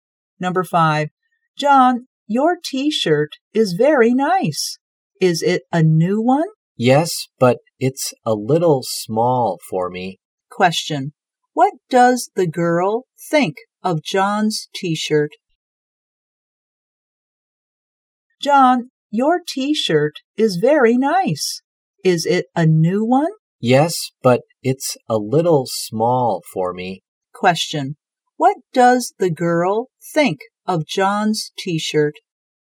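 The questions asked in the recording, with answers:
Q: What does the girl think of John's t-shirt?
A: It's very nice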